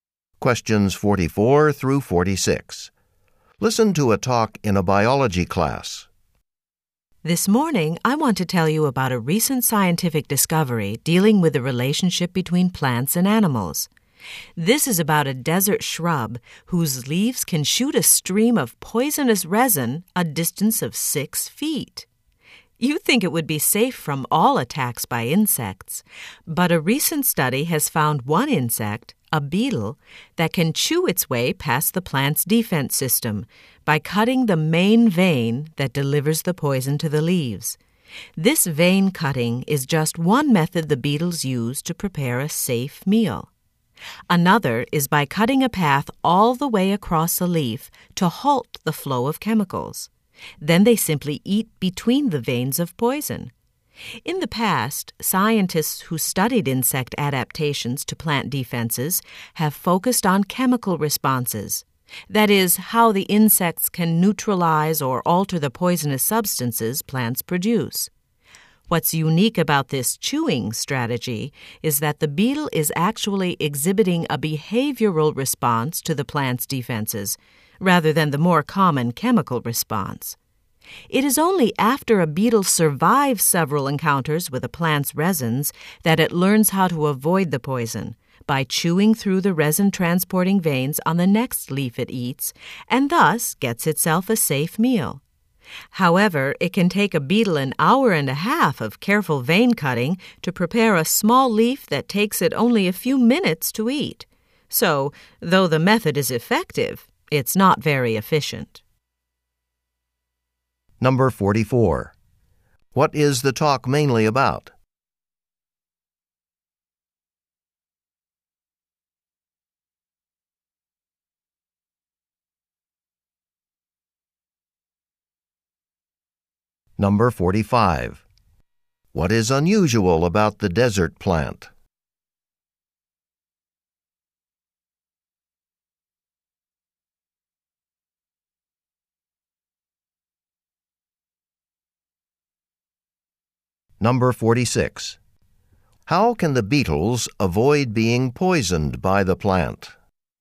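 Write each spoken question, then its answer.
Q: What is the talk mainly about?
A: How a beetle gets past a desert shrub's poison defense.

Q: What is unusual about the desert plant?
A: Its leaves can shoot poisonous resin up to 6 feet.

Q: How can the beetles avoid being poisoned by the plant?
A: They chew through the veins that carry the resin.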